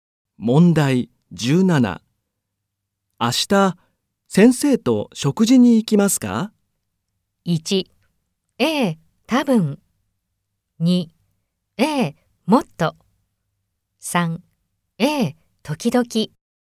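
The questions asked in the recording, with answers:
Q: 明日、先生と食事に行きますか?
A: 1: ええ、多分。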